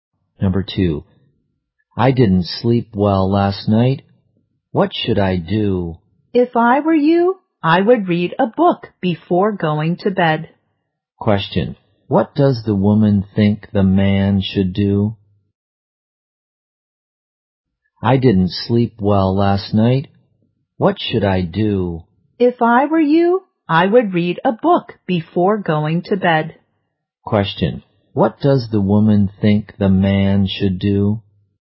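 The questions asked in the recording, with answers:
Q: what does the woman think the man should do?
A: Read a book before going to bed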